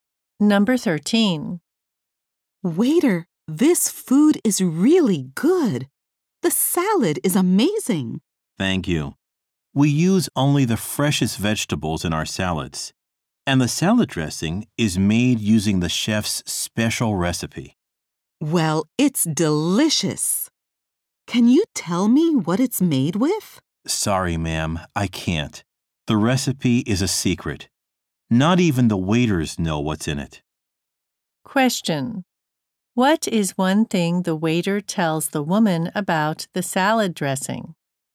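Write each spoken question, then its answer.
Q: What is one thing the waiter tells the woman about the salad dressing?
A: The recipe is a secret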